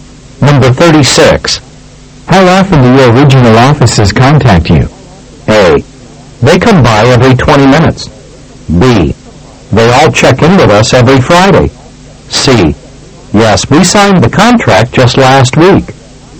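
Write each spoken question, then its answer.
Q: How often do your original offices contact you?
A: B: They all check in with us every Friday.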